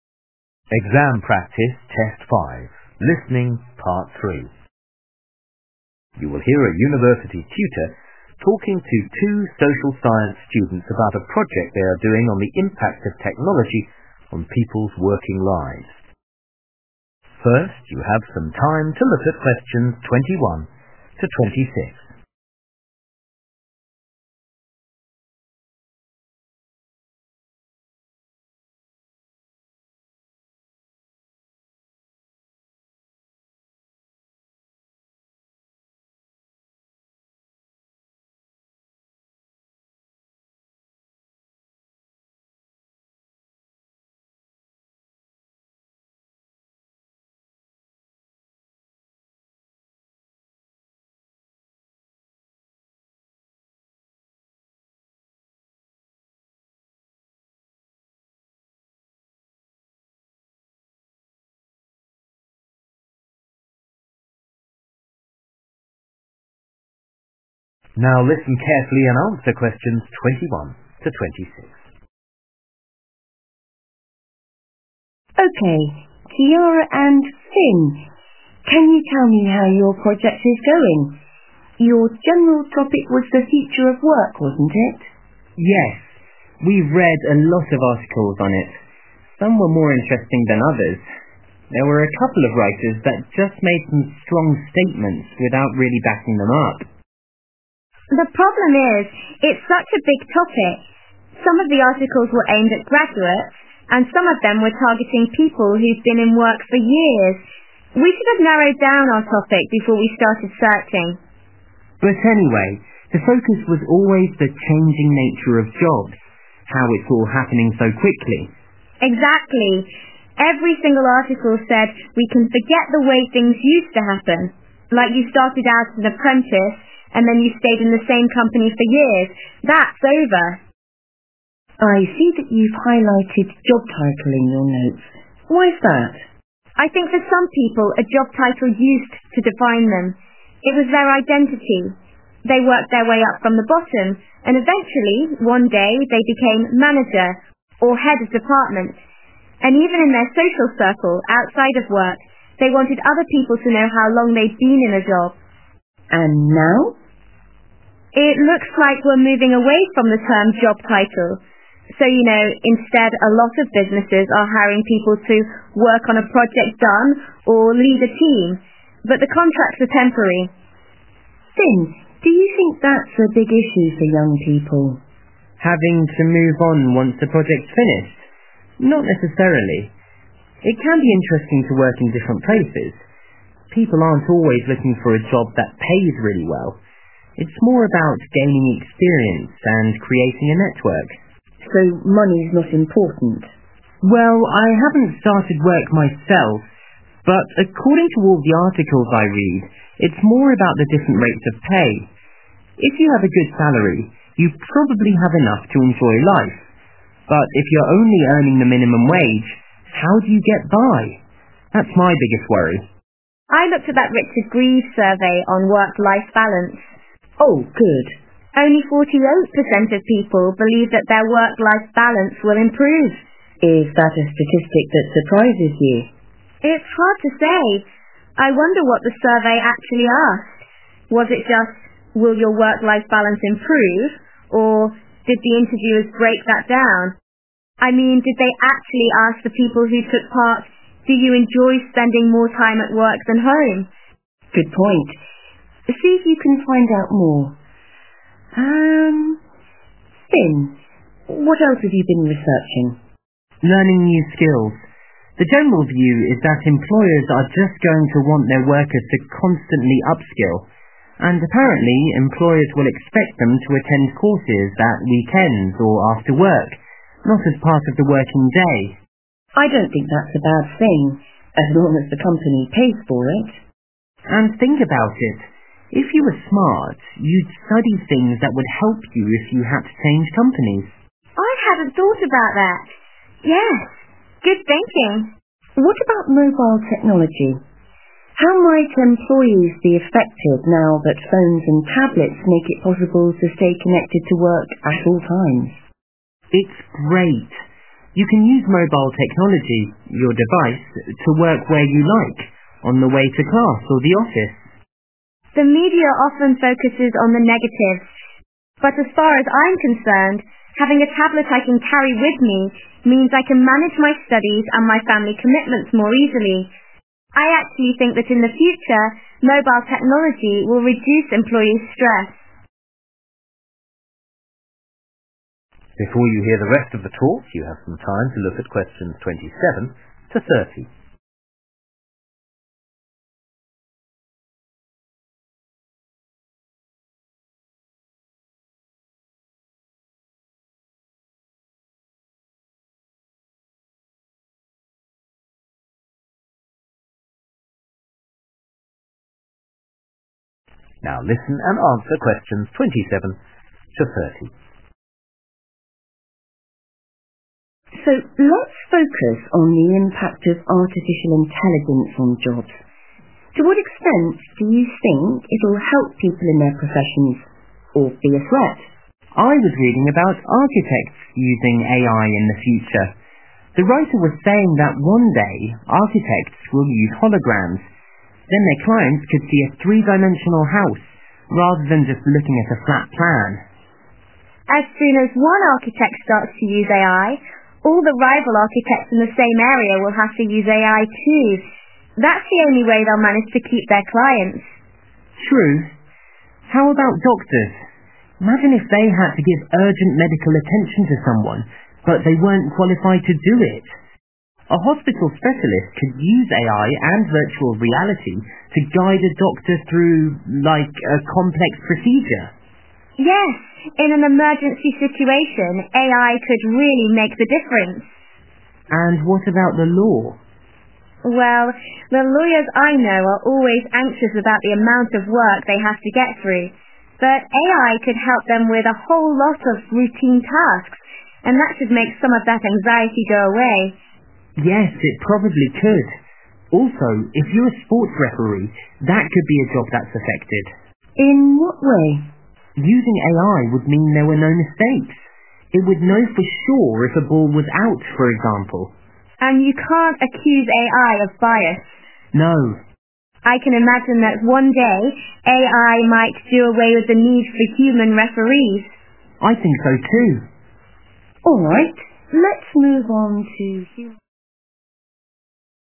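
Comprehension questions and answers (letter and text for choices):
Questions 21-26. Write the correct letter, A, B, or C, next to Questions 21-26.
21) Kiara and Finn agree that the articles they read on the future of work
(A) mainly reflect the concerns of older employees.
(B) refer to the end of a traditional career path.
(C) tend to exaggerate the likely changes.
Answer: (B) refer to the end of a traditional career path.

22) What point does Kiara make about the phrase "job title"?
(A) It is no longer relevant in modern times.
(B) It shows colleagues how to interact with each other.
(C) It will only apply to people higher up in an organization.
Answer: (A) It is no longer relevant in modern times.

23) What issue affecting young employees is Finn most concerned about?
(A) lack of job security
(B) income inequality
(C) poor chances of promotion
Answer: (B) income inequality

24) What is Kiara's attitude towards the Richards-Greeves survey on work-life balances?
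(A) She thinks that the findings are predictable.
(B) She is curious about the kind of work the interviewees do.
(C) She believes it would be useful to know what the questions were.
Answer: (C) She believes it would be useful to know what the questions were.

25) Finn and Kiara agree that if employees are obliged to learn new skills,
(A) they should learn ones which might be useful in another job.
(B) they should not be forced to learn them in their own time.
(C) they should receive better guidance from training departments.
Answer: (A) they should learn ones which might be useful in another job.

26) When Finn talks about the impact of mobile technology Kiara responds by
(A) emphasizing the possible disadvantages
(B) describing her personal experience.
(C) mentioning groups who benefit most from devices.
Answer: (B) describing her personal experience.

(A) It will give them a greater sense of satisfaction.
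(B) It will encourage them to compete with one another.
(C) It will reduce the level of stress they have.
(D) It may eventually lead to their jobs disappearing.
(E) It could prevent them from coming to harm.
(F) It will enable them to do tasks they have not trained for.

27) Architects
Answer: (B) It will encourage them to compete with one another.

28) Doctors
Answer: (F) It will enable them to do tasks they have not trained for.

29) Lawyers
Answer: (C) It will reduce the level of stress they have.

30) Sports referees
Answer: (D) It may eventually lead to their jobs disappearing.

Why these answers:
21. Exactly. Every single article said we can forget the way things used to happen. Like you started out as an apprentice and then you stayed in the same company for years. That's over. [Mỗi bài báo đều nói rằng chúng ta có thể quên đi cách mọi thứ đã từng xảy ra. Giống như bạn bắt đầu với tư cách là một người học việc và sau đó bạn ở cùng một công ty trong nhiều năm. 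Thế là xong]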